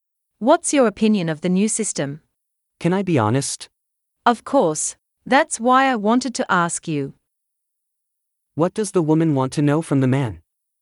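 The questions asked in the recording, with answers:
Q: What does the woman want to know from the man?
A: His opinion of the new system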